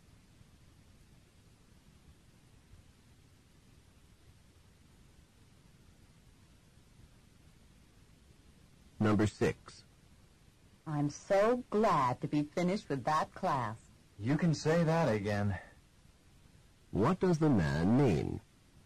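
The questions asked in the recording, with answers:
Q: What does the man mean?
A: He agrees; he is also glad to be finished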